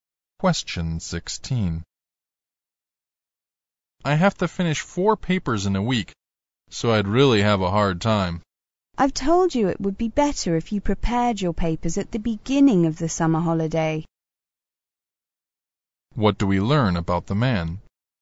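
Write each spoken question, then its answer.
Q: What do we learn about the man?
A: He didn't start his papers early and now has to rush to finish four in a week.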